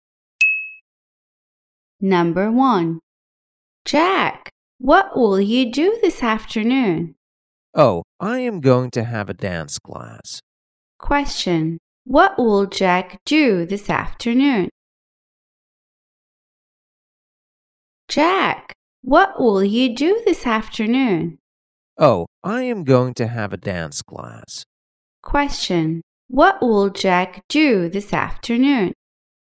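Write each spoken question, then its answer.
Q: Question, what will Jack do this afternoon?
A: Have a dance class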